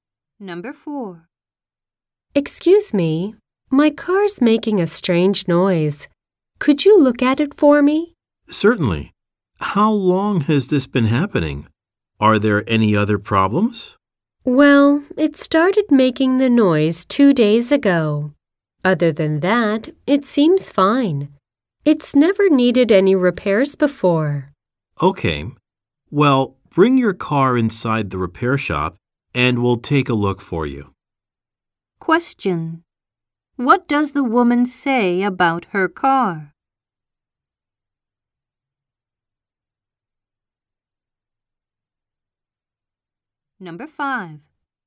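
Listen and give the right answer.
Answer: It has never needed repairs before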